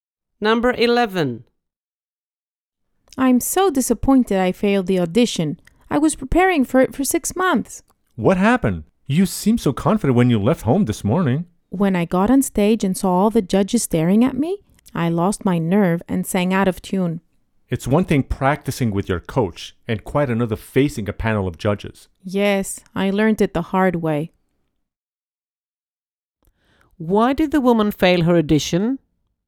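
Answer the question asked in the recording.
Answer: She lost her nerve in front of the judges and sang out of tune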